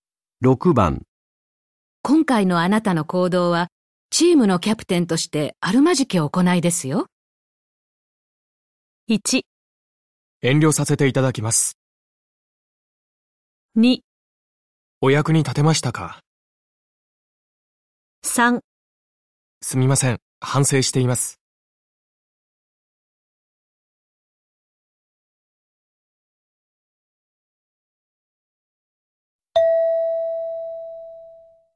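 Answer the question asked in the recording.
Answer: 3: すみません、反省しています。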